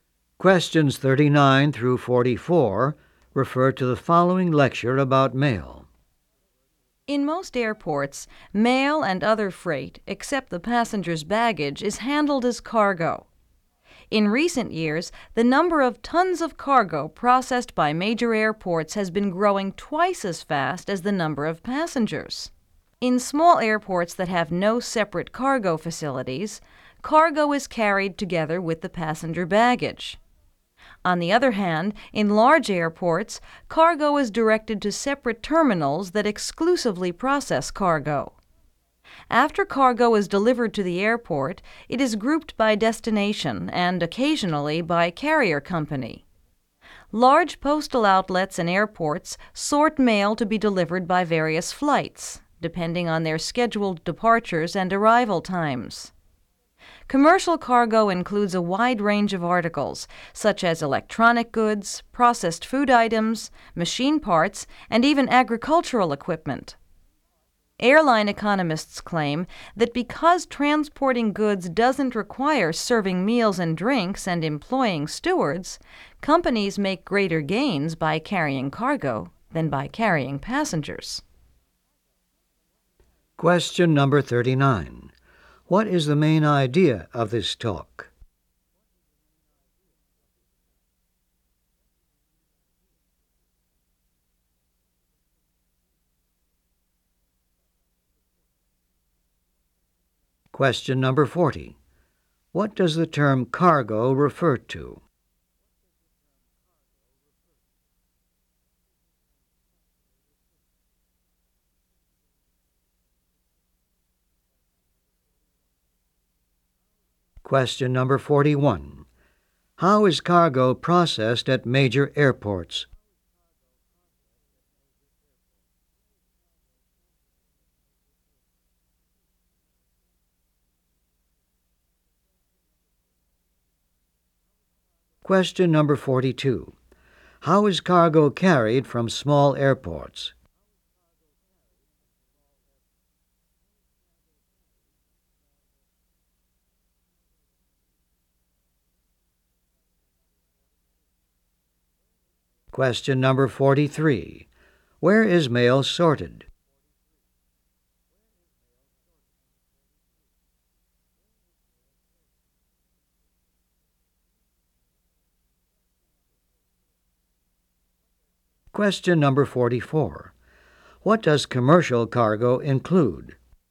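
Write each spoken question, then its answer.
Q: What does the term cargo refer to?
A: Mail and other freight, except passengers' baggage

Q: How is cargo processed at major airports?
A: It is directed to separate cargo terminals

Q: How is cargo carried from small airports?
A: Together with passenger baggage

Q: Where is mail sorted?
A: At large postal outlets and airports

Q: What does commercial cargo include?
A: Electronic goods, processed food, machine parts and agricultural equipment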